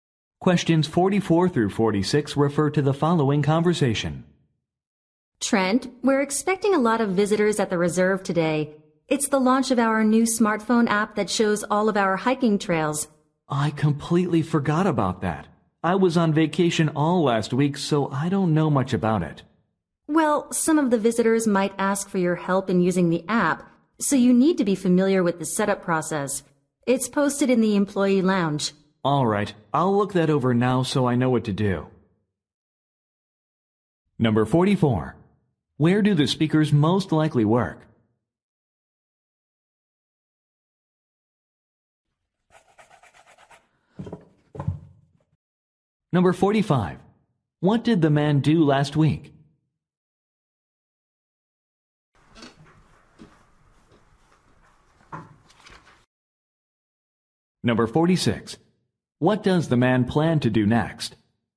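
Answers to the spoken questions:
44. At a nature reserve with hiking trails
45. He was on vacation
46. Read the app setup process posted in the employee lounge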